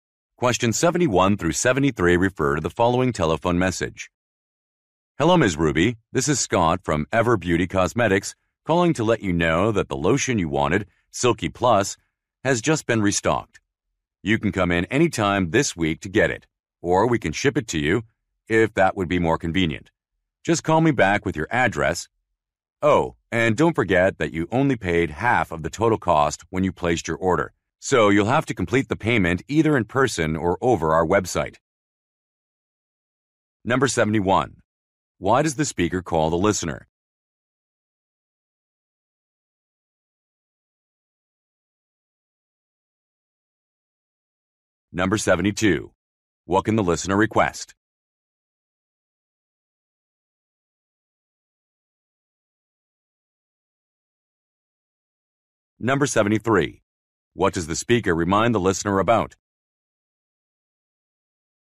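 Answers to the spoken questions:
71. To say the lotion she wanted, Silky Plus, has been restocked
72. To have the product shipped to her
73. She still has to pay the rest of the cost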